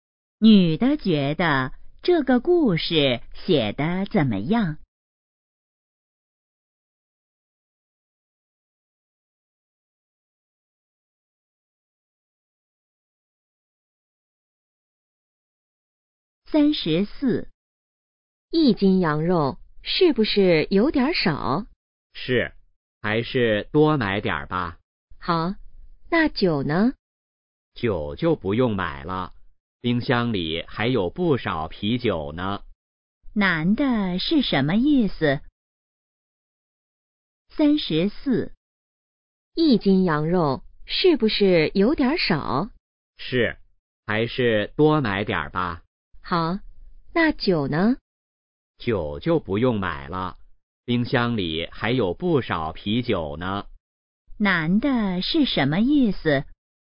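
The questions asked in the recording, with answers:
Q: 男的是什么意思?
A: 不用买酒了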